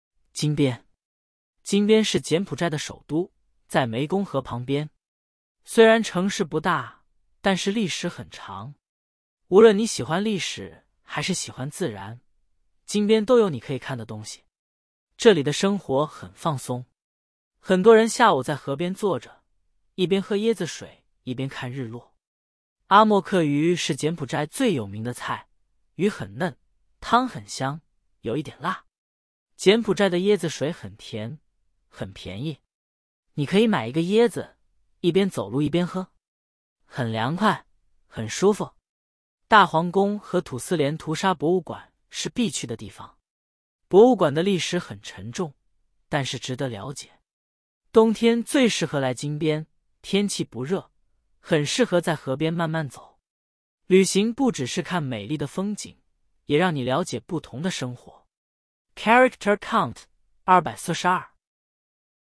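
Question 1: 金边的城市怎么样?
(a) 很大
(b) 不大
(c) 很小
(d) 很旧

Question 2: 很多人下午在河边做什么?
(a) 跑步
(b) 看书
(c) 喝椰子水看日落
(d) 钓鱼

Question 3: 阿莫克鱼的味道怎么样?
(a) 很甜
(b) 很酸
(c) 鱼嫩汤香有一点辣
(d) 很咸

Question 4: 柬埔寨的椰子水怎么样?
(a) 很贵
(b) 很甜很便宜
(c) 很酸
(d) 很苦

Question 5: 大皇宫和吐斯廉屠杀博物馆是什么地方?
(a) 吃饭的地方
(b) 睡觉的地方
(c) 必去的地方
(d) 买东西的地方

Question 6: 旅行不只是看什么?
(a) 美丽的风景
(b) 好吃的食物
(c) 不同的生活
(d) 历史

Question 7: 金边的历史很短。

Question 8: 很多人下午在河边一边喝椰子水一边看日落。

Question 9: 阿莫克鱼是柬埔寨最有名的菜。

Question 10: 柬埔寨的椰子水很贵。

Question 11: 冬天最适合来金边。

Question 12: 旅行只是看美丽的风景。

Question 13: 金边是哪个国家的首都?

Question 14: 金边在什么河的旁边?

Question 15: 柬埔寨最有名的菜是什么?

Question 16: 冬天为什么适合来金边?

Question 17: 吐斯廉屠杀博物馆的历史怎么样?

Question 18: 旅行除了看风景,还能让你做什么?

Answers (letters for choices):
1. b
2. c
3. c
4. b
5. c
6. a
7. 错
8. 对
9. 对
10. 错
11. 对
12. 错
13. 柬埔寨
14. 湄公河
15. 阿莫克鱼
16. 天气不热,很适合在河边慢慢走
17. 很沉重,但是值得了解
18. 了解不同的生活

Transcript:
金边
金边是柬埔寨的首都,在湄公河旁边。虽然城市不大,但是历史很长。无论你喜欢历史还是喜欢自然,金边都有你可以看的东西。
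这里的生活很放松。很多人下午在河边坐着,一边喝椰子水一边看日落。阿莫克鱼是柬埔寨最有名的菜,鱼很嫩,汤很香,有一点辣。
柬埔寨的椰子水很甜,很便宜。你可以买一个椰子,一边走路一边喝。很凉快,很舒服。
大皇宫和吐斯廉屠杀博物馆是必去的地方。博物馆的历史很沉重,但是值得了解。冬天最适合来金边,天气不热,很适合在河边慢慢走。旅行不只是看美丽的风景,也让你了解不同的生活。
Character Count: 242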